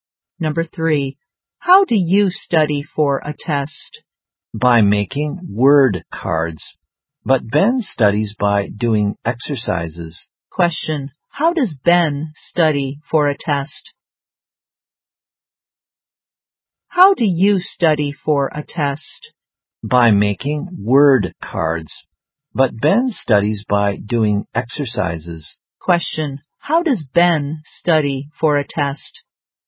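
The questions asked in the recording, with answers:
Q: Question, how does Ben study for a test?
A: By doing exercises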